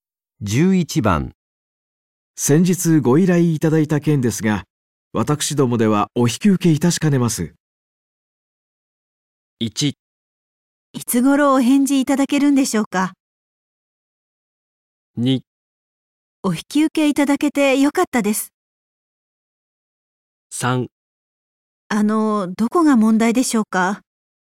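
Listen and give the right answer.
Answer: 3: どこが問題でしょうか。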